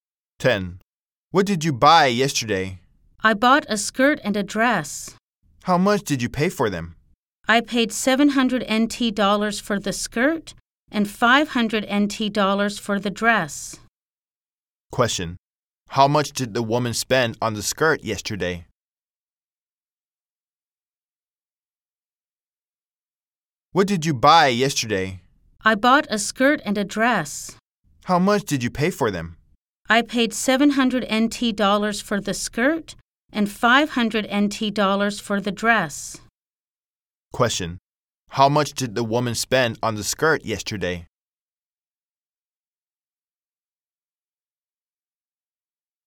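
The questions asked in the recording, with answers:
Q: Question. How much did the woman spend on the skirt yesterday?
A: 700 NT dollars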